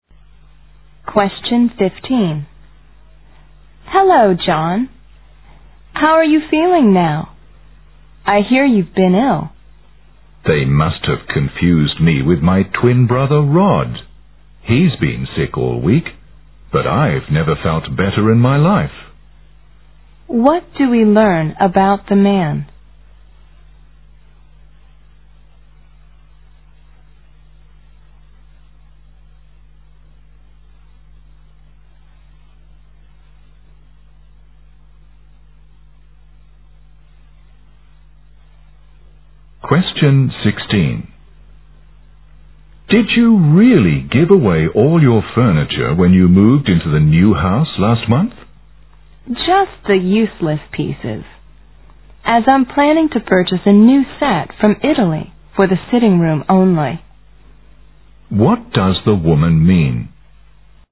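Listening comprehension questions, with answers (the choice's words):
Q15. What do we learn about the man?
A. He is taking care of this twin brother.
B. He has been feeling ill all week.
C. He is worried about Rod's health.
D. He has been in perfect condition.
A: He has been in perfect condition.

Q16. What does the woman mean?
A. She sold all her furniture before she moved house.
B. She still keeps some old furniture in her new house.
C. She plans to put all her old furniture in the basement.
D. She brought a new set of furniture from Italy last month.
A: She still keeps some old furniture in her new house.

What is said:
W: Hello, John. How are you feeling now? I hear you've been ill.
M: They must have confused me with my twin brother Rod. He's been sick all week, but I've never felt better in my life.
Q: What do we learn about the man?
M: Did you really give away all your furniture when you moved into the new house last month?
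W: Just the useless pieces, as I'm planning to purchase a new set from Italy for the sitting room only.
Q: What does the woman mean?

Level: 大学英语四级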